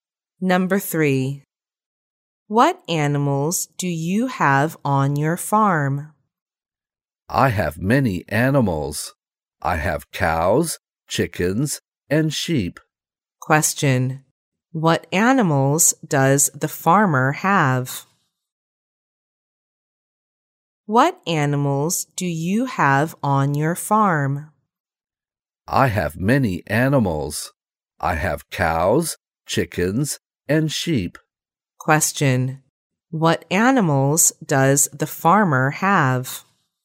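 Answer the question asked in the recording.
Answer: Cows, chickens and sheep.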